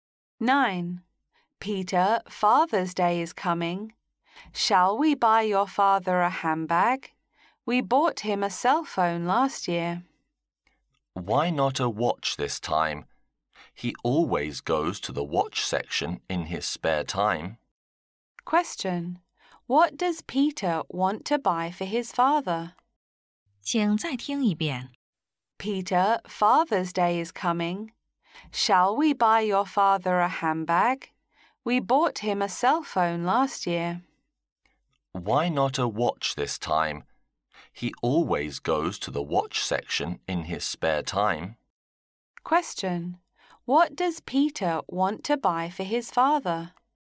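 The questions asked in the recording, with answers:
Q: What does Peter want to buy for his father?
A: A watch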